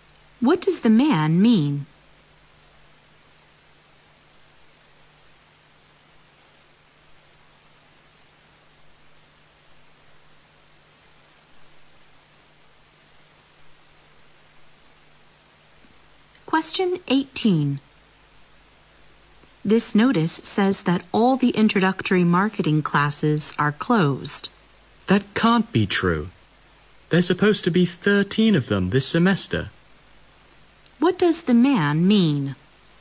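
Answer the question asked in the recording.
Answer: He doesn't believe that all the introductory marketing classes are closed.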